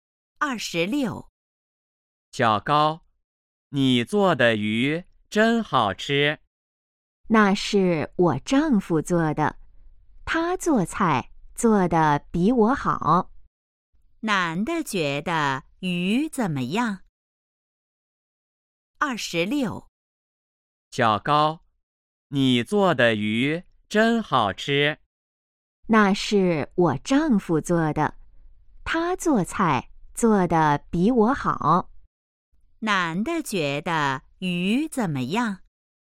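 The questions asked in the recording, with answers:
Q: 男的觉得鱼怎么样?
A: 很好吃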